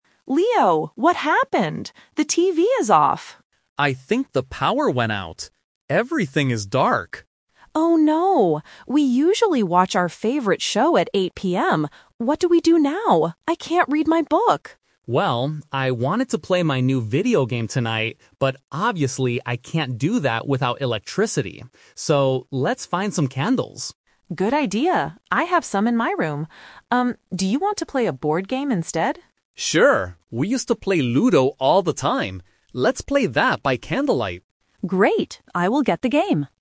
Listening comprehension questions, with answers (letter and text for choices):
Listen to the conversation and choose the correct answer (A, B, or C).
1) What do the siblings usually do at 8:00 PM?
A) Read a book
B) Watch a TV show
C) Play a board game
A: B) Watch a TV show

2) What did Leo originally want to do tonight?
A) Play a video game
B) Play Ludo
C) Go to sleep early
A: A) Play a video game

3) What will Leo and Emma do next?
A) Watch TV in the dark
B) Read books by candlelight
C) Play a board game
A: C) Play a board game

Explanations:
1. Emma says, "We usually watch our favorite show at 8:00 PM." Option A (Read a book) is a trap because she mentions it, but she says she can't do it now. Option C is what they will do later.
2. Leo states, "I wanted to play my new video game tonight, but obviously I can't do that." Option B (Play Ludo) is a trap because it is their new plan, not his original plan. Option C is plausible for a dark evening, but it is not mentioned in the audio.
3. Emma suggests playing a board game, and Leo agrees ("Let's play that by candlelight"). Option B (Read books) is a trap because Emma explicitly says she can't read her book. Option A is impossible because there is no power.

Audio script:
Emma: Leo, what happened? The TV is off!
Leo: I think the power went out. Everything is dark.
Emma: Oh no! We usually watch our favorite show at 8:00 PM. What do we do now? I can't read my book.
Leo: Well, I wanted to play my new video game tonight, but obviously I can't do that without electricity. So, let's find some candles.
Emma: Good idea. I have some in my room. Um, do you want to play a board game instead?
Leo: Sure! We used to play Ludo all the time. Let's play that by candlelight.